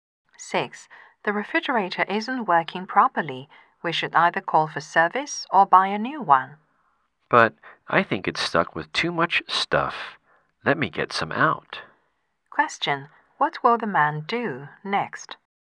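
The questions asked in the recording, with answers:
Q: What will the man do next?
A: Take some things out of the refrigerator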